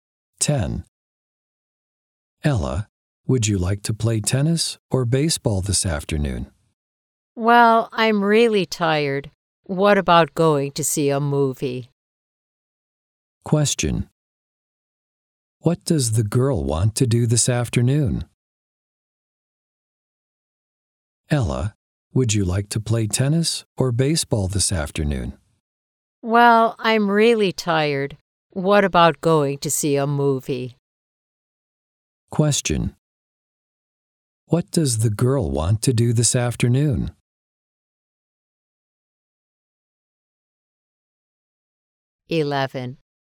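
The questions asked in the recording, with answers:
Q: What does the girl want to do this afternoon?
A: Go to see a movie.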